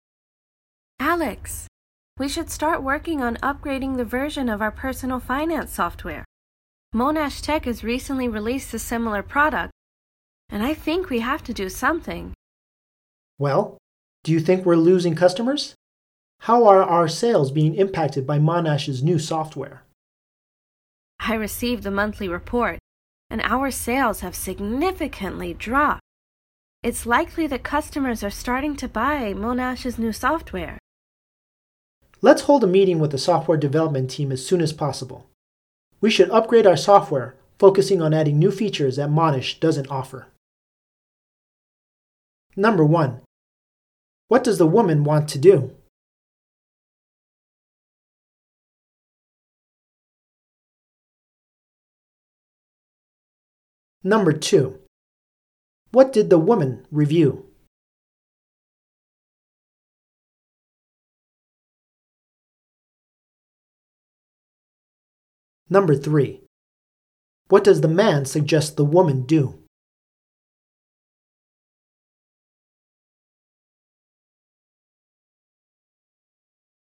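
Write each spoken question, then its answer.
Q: What does the woman want to do?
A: Upgrade the company's personal finance software

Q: What did the woman review?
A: The monthly sales report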